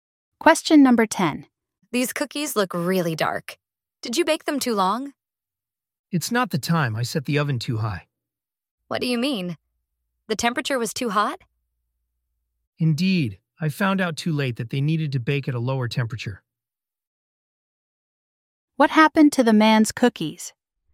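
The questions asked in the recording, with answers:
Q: What happened to the man's cookies?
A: They got too dark because the oven was set too high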